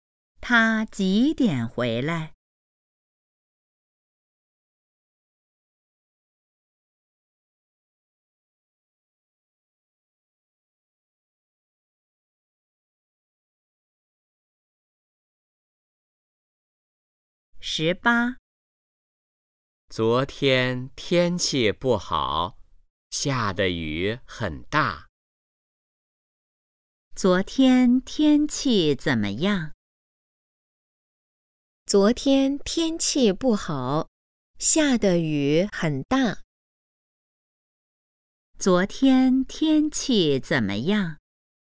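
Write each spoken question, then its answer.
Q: 昨天天气怎么样?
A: 不好,下大雨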